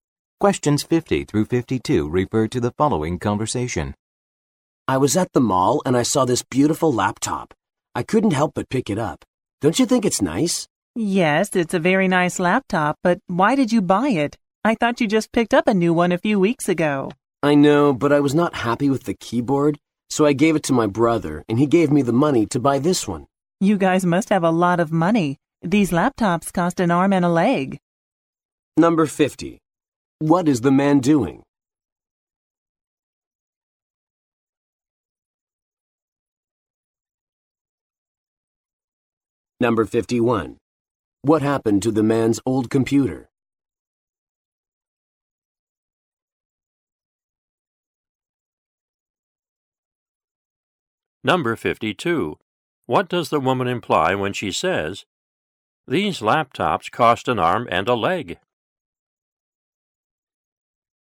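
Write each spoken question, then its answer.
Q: What is the man doing?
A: Showing his new laptop

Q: What happened to the man's old computer?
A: He gave it to his brother

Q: What does the woman imply when she says, "These laptops cost an arm and a leg"?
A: The laptops are very expensive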